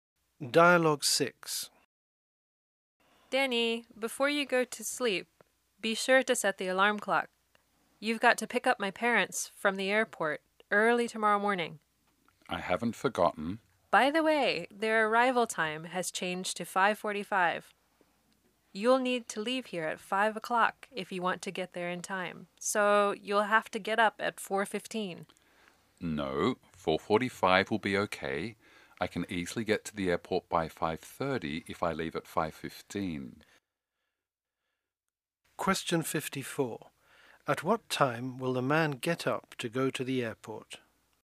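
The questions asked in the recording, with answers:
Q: At what time will the man get up to go to the airport?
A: 4:45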